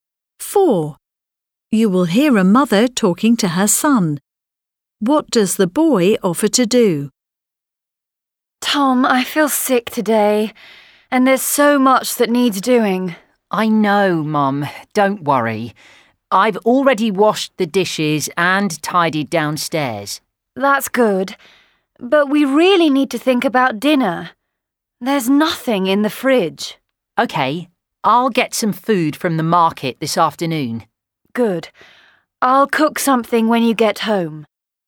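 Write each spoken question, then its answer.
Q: What does the boy offer to do?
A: Buy food at the market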